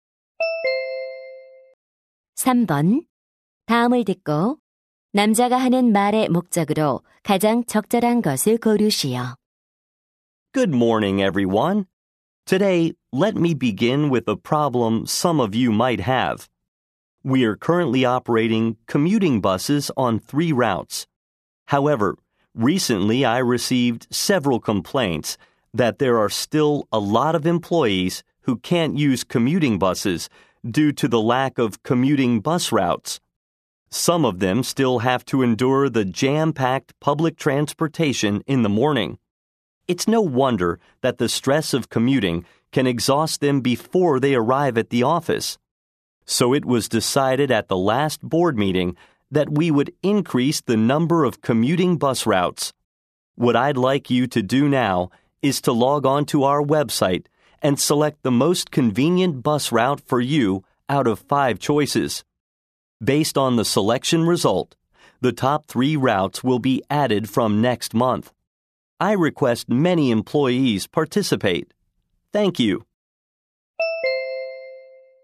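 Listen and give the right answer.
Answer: 웹사이트에서 원하는 통근 버스 노선을 선택하도록 요청하려고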